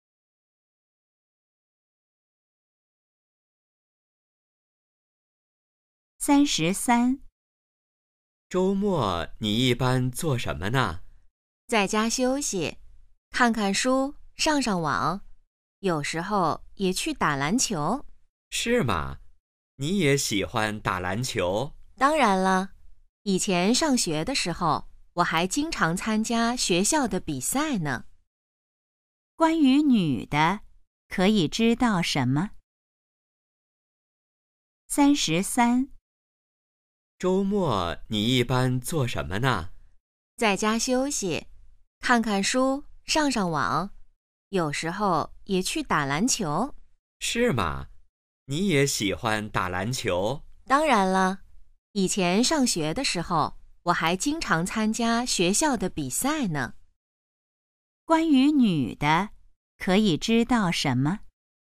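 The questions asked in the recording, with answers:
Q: 关于女的,可以知道什么?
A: 她喜欢打篮球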